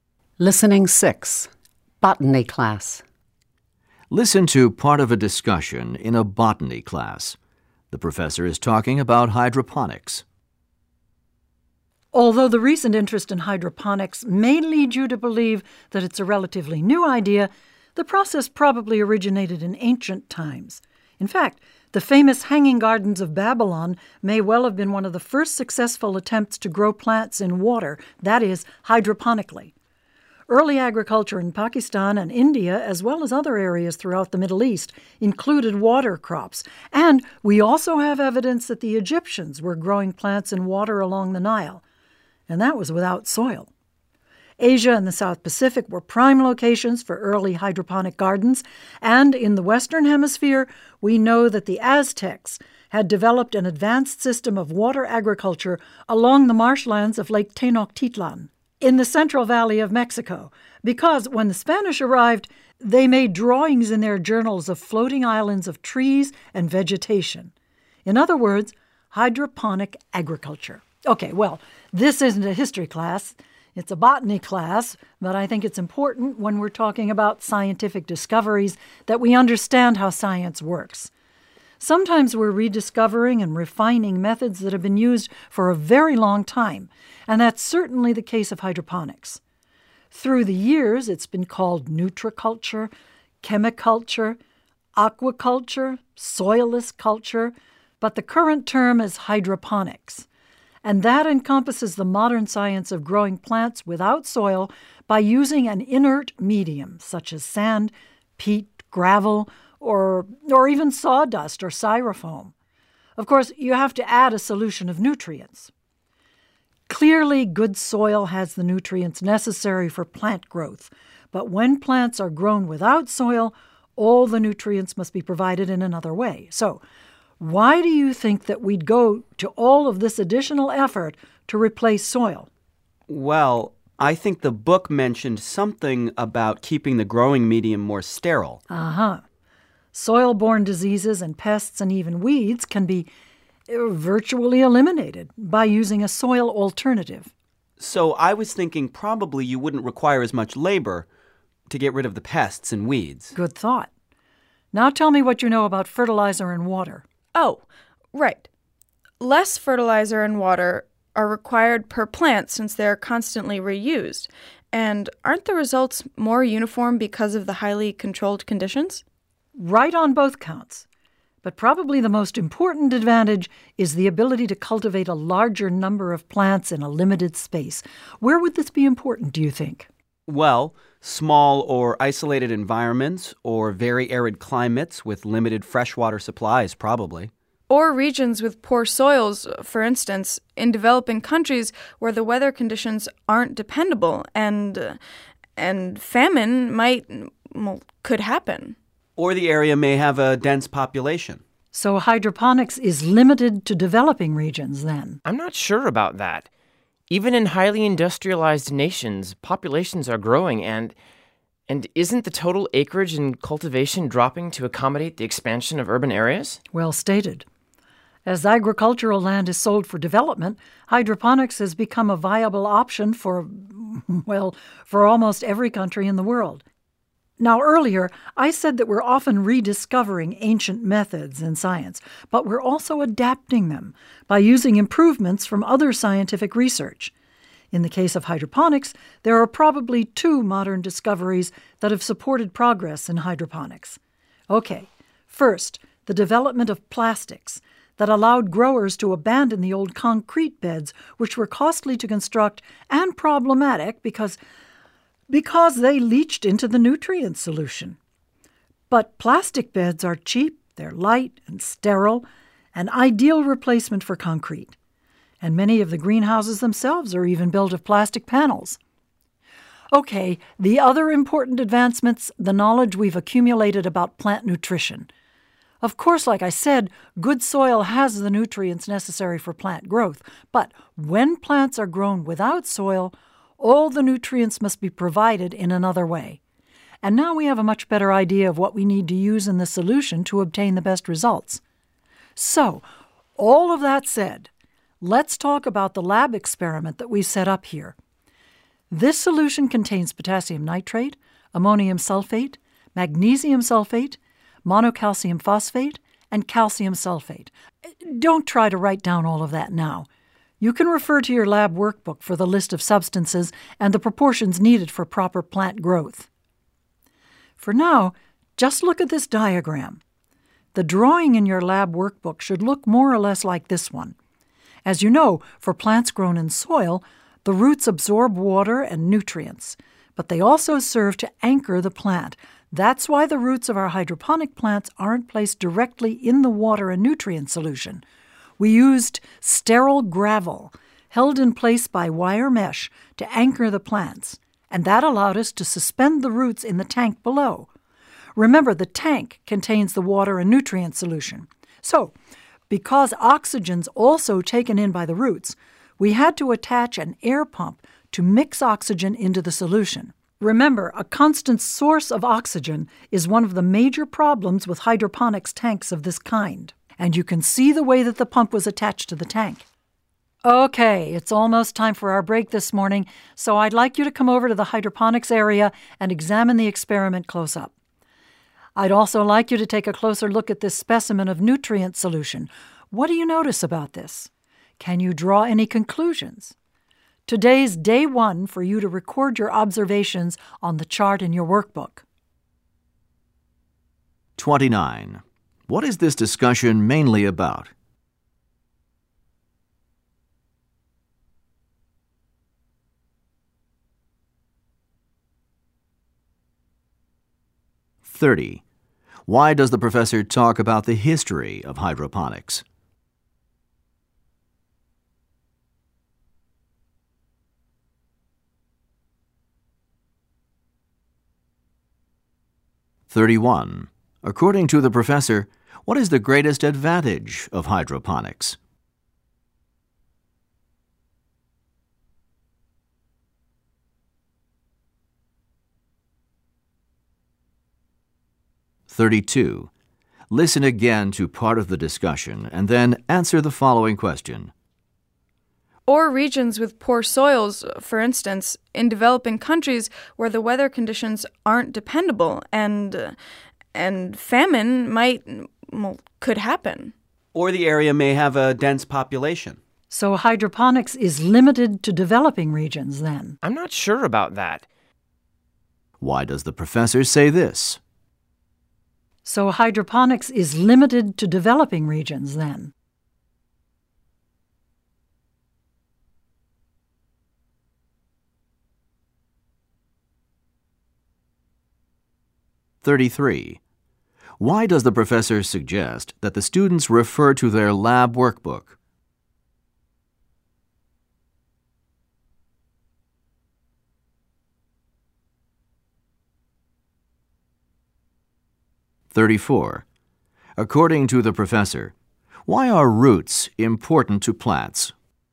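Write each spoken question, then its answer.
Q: What is this discussion mainly about?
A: Hydroponics, growing plants without soil

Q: Why does the professor talk about the history of hydroponics?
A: To show that science often rediscovers and refines old methods

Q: According to the professor, what is the greatest advantage of hydroponics?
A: More plants can be grown in a limited space

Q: Why does the professor suggest that the students refer to their lab workbook?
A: To find the list of substances and proportions for the nutrient solution

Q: According to the professor, why are roots important to plants?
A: They take in water, nutrients and oxygen and anchor the plant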